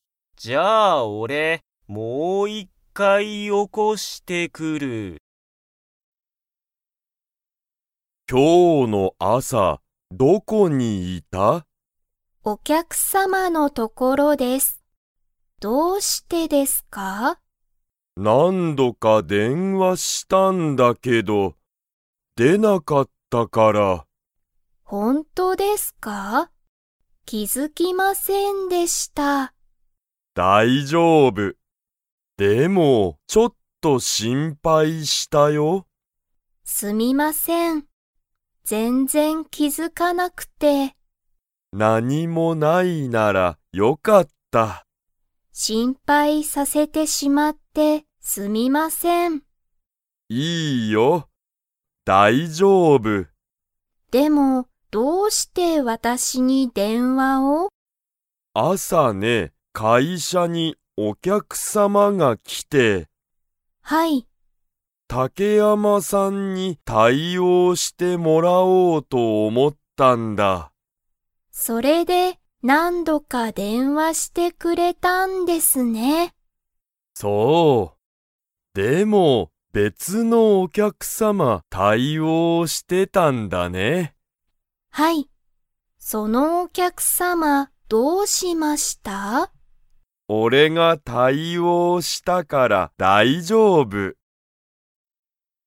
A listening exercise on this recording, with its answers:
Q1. 竹山たけやまさんは、電話でんわに 。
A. 気付きづいた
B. 気付きづかなかった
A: 気付きづかなかった

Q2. 朝あさ、会社かいしゃに誰だれが来きましたか?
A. 竹山たけやまさん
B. 竹山たけやまさんの友達ともだち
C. お客様きゃくさま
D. 先生せんせい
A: お客様きゃくさま

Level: Level 3

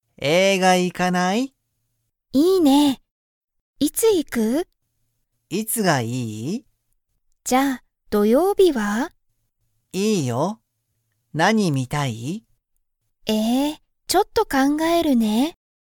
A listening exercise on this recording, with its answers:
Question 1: タカシとハルは、____映画(えいが)に行(い)く。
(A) 今(いま)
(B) 今日(きょう)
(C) 土曜日(どようび)に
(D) 日曜日(にちようび)に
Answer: 土曜日(どようび)に

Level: Level 1

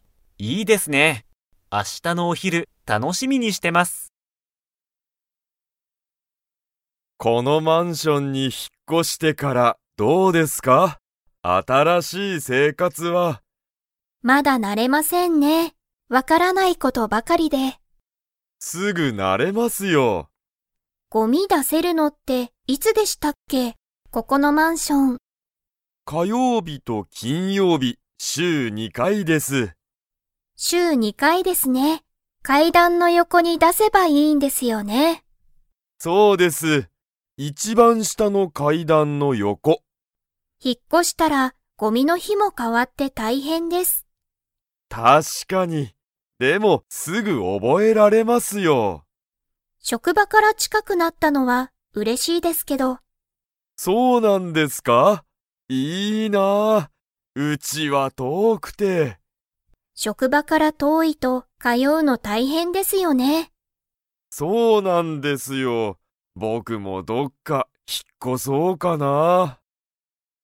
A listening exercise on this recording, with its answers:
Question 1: 近藤こんどうさんは、新あたらしい生活せいかつに 。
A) もう慣なれた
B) まだ慣なれていない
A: まだ慣なれていない

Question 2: ごみはどこに出だせばいいですか?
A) 階段かいだんの横よこ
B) 一番いちばん上うえ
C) 玄関げんかん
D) 職場しょくば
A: 階段かいだんの横よこ

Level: Level 4

